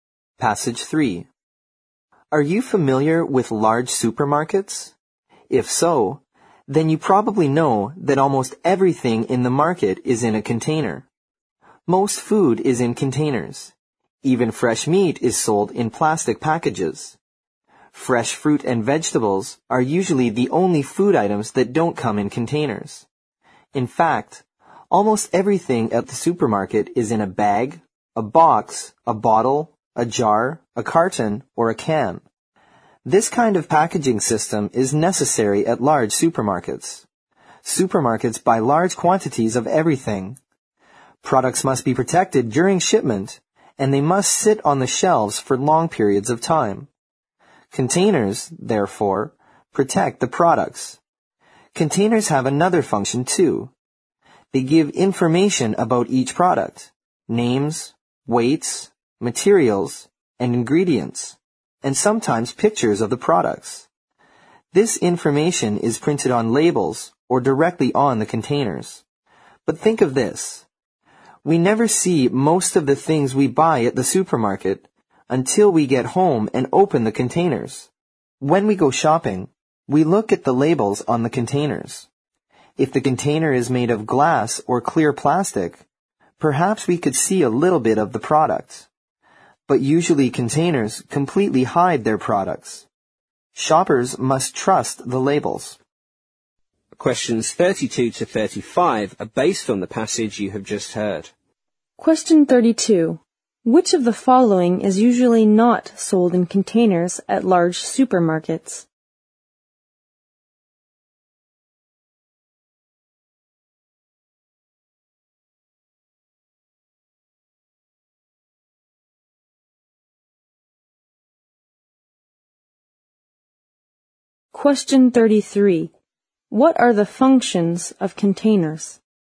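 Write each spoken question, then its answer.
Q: Which of the following is usually not sold in containers at large supermarkets?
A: Fresh fruit and vegetables

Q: What are the functions of containers?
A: To protect products and give information about them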